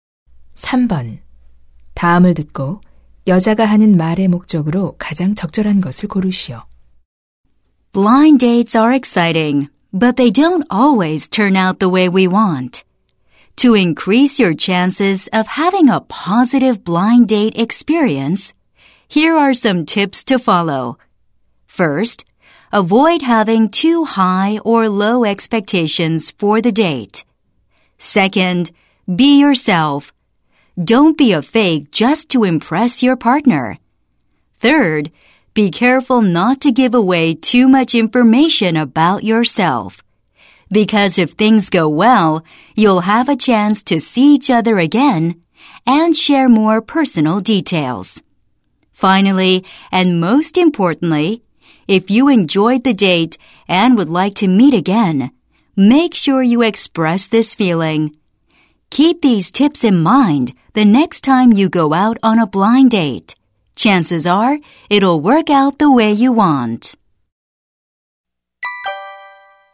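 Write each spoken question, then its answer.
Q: 다음을 듣고 여자가 하는 말의 목적으로 가장 적절한 것을 고르시오.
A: 소개팅을 성공적으로 하기 위한 조언을 제공하려고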